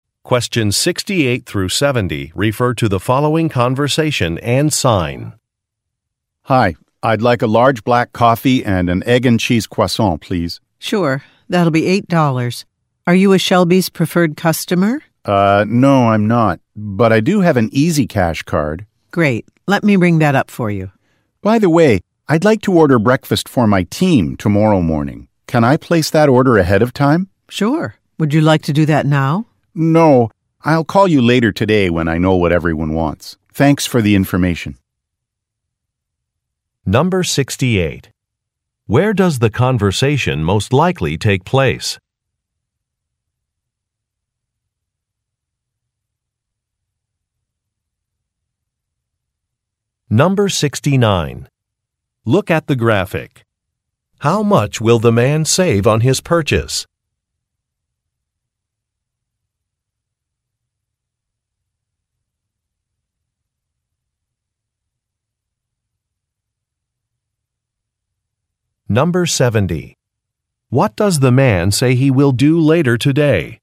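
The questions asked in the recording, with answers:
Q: Where does the conversation most likely take place?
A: At a coffee shop

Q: What does the man say he will do later today?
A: Call to place a breakfast order for his team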